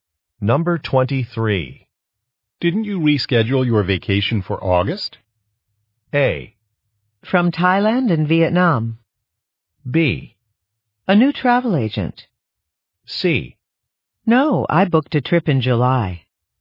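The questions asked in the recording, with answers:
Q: Didn't you reschedule your vacation for August?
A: C: No, I booked a trip in July.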